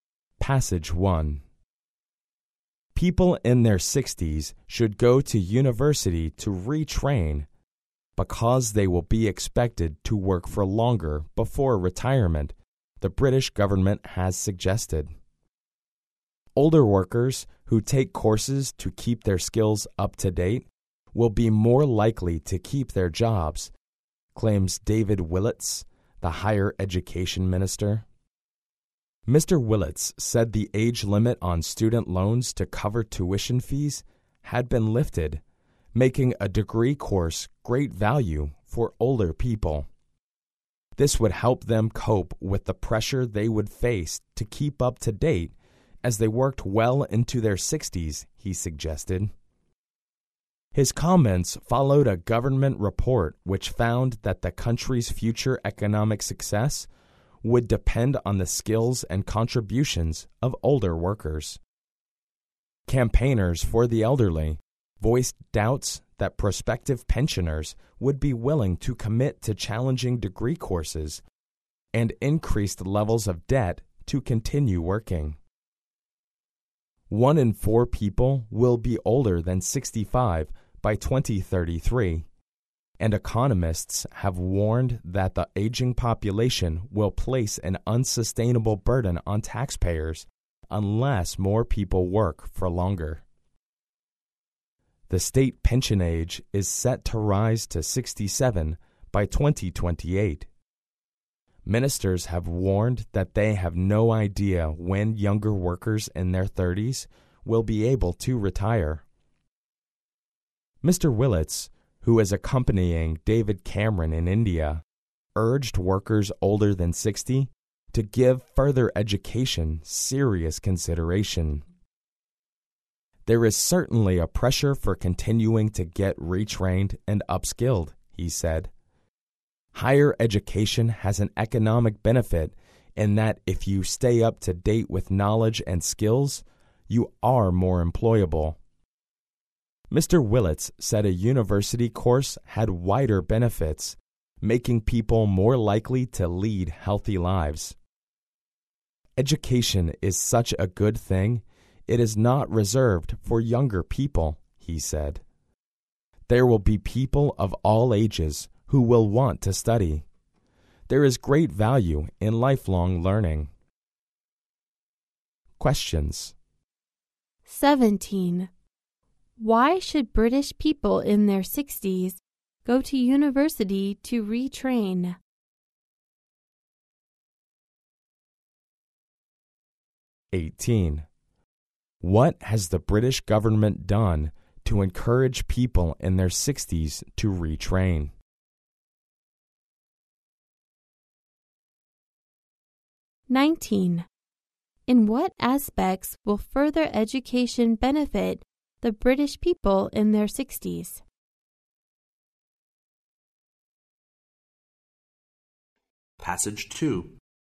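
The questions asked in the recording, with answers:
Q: Why should British people in their 60s go to university to retrain?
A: Because they will be expected to work for longer before retirement

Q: What has the British government done to encourage people in their 60s to retrain?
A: It lifted the age limit on student loans for tuition fees

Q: In what aspects will further education benefit the British people in their 60s?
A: It makes them more employable and more likely to lead healthy lives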